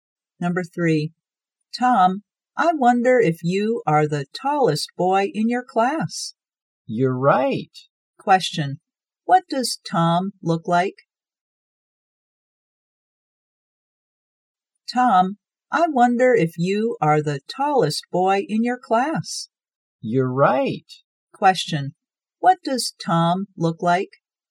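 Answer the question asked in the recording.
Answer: He is the tallest boy in his class (tall)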